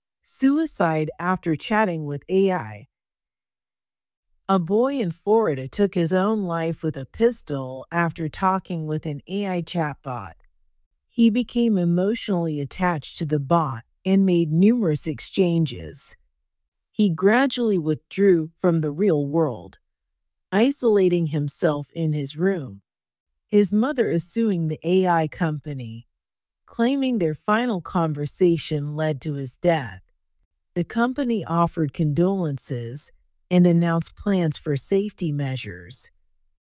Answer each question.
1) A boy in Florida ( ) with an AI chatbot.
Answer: took his own life with a pistol after talking

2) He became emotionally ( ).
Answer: attached to the bot and made numerous exchanges

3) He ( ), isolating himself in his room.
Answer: gradually withdrew from the real world

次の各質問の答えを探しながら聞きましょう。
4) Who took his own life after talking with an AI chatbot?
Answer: A boy in Florida.

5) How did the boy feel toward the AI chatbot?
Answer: He became emotionally attached.

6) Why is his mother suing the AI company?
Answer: She claims their final conversation led to his death.

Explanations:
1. ▶「with a pistol」を「with the pistol」と定冠詞「the」で書いてしまった。 ⇒ 本文に初めて登場する事物は固有名詞を除き、不定冠詞「a/an」を取ります。 いきなり「そのピストルで」と限定しても「どのピストル」なのかわかりません。
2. ▶ 「the bot」が何なのかわからず「the bar」と書いてしまった。 ⇒ ここでの「bot」は「AI chatbot(対話型AI)」を指しています。 bot」は「robot」の略語であり、「人の代わりに自動的に操作するプログラム」を意味する単語です。
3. ▶ 「withdrew」を聞き取れず「with true」と書いてしまった。 ⇒ ここでの「withdraw from」は「〜から身を引く、後退する」という意味です。 つまり、この少年が「現実世界から孤立して引きこもるようになった過程」を示しています。

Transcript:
Suicide After Chatting with AI
A boy in Florida took his own life with a pistol after talking with an AI chatbot.
He became emotionally attached to the bot and made numerous exchanges.
He gradually withdrew from the real world, isolating himself in his room.
His mother is suing the AI company, claiming their final conversation led to his death.
The company offered condolences and announced plans for safety measures.